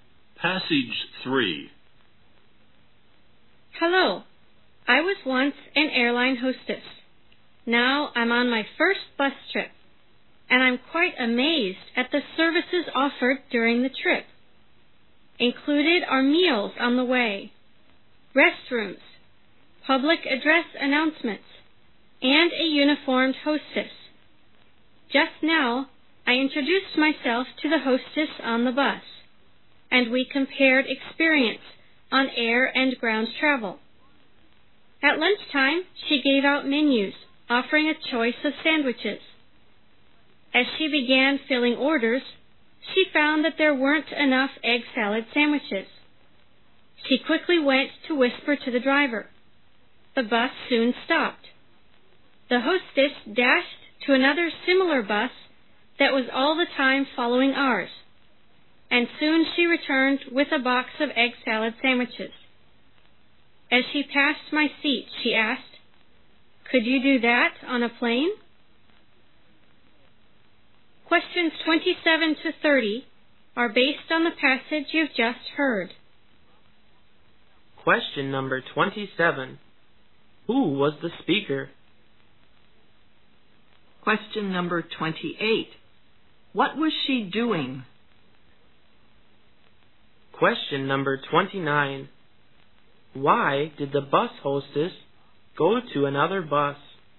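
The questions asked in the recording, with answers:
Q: Who was the speaker?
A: A former airline hostess

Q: What was she doing?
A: Taking her first bus trip

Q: Why did the bus hostess go to another bus?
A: To get more egg salad sandwiches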